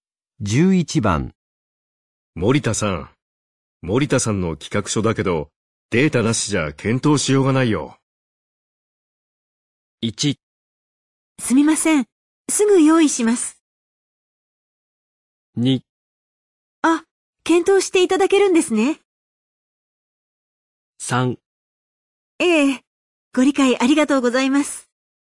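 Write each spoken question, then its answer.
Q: 森田さん。森田さんの企画書だけど、データなしじゃ検討しようがないよ。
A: 1: すみません。すぐ用意します。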